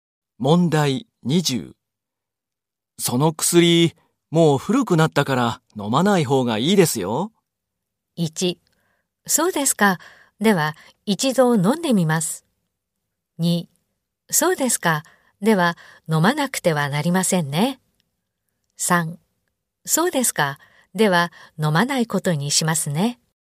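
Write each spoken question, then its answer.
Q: その薬、もう古くなったから飲まない方がいいですよ。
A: 3: そうですか。では、飲まないことにしますね。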